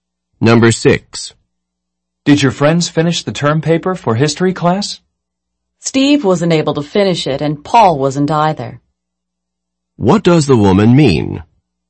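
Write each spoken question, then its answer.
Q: What does the woman mean?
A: Neither Steve nor Paul finished the paper.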